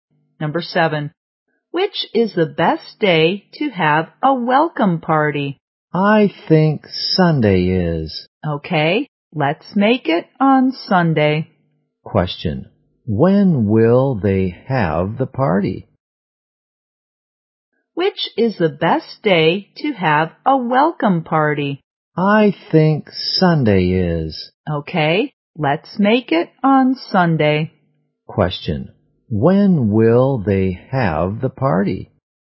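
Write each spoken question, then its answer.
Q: when will they have the party?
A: On Sunday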